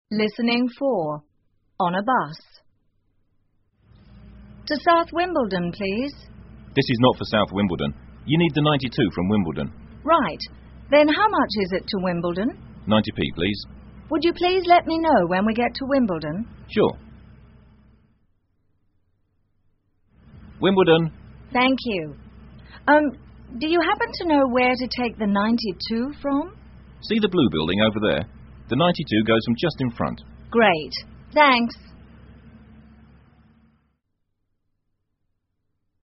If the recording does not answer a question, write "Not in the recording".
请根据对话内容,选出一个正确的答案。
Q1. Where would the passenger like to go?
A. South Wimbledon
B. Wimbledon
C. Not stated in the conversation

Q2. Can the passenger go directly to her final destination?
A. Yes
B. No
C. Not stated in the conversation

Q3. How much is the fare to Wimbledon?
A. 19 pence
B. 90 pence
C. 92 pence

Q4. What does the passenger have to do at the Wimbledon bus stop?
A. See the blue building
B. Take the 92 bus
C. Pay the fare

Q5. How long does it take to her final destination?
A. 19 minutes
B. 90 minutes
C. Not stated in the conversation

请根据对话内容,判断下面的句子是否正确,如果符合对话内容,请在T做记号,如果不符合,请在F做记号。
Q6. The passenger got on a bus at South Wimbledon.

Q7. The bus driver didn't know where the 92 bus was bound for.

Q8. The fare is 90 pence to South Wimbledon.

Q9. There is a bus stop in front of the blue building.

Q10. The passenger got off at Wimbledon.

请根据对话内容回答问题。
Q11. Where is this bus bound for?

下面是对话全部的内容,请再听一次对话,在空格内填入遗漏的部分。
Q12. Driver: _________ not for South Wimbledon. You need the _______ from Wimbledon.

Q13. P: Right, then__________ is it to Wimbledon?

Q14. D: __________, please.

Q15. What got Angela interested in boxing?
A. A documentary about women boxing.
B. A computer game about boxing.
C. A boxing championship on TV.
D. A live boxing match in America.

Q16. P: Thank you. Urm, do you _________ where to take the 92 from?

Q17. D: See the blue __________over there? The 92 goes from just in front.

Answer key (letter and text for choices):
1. A. South Wimbledon
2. B. No
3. B. 90 pence
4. B. Take the 92 bus
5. C. Not stated in the conversation
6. F
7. F
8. F
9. T
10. T
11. Wimbledon
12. This is, 92
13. how much
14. 90p
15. Not in the recording
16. happen to know
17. building